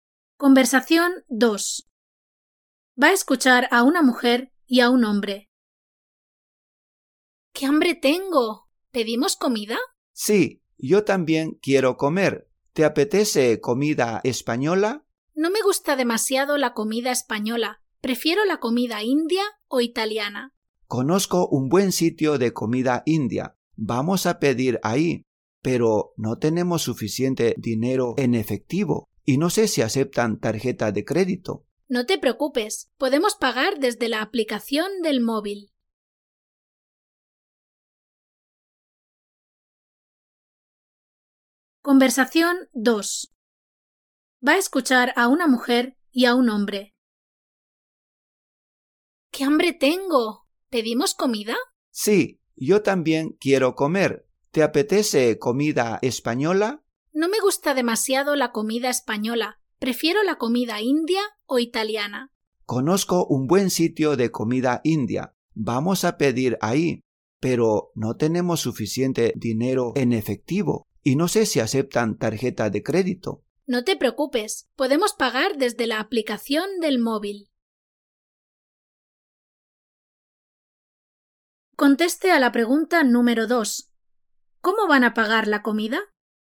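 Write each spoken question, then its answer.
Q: ¿Cómo van a pagar la comida?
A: Desde la aplicación del móvil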